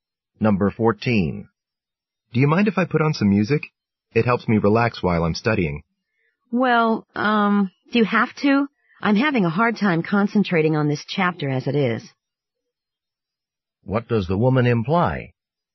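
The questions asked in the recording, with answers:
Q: What does the woman imply?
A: She would rather he didn't play music because it would distract her.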